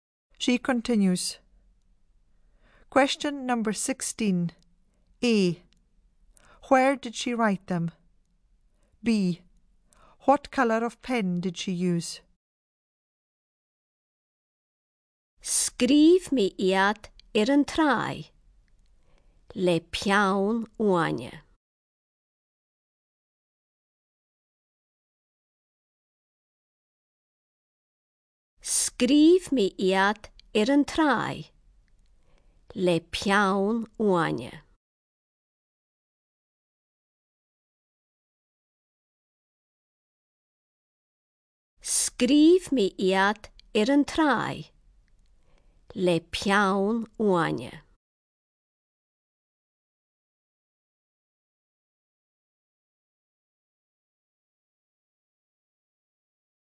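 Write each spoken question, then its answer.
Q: What colour of pen did she use?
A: Green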